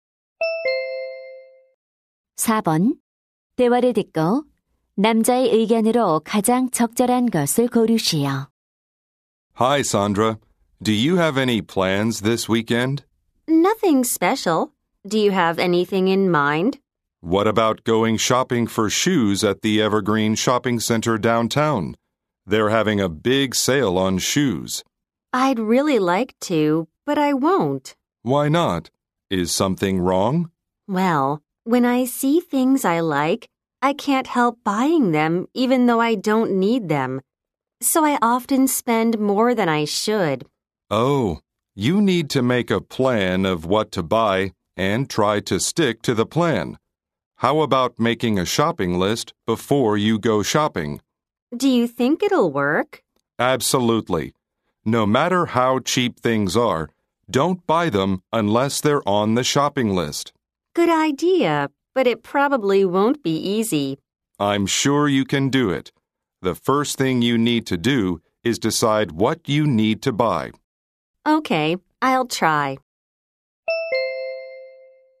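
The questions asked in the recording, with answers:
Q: 대화를 듣고 남자의 의견으로 가장 적절한 것을 고르시오.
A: 쇼핑 전에 구매 목록을 작성해야 한다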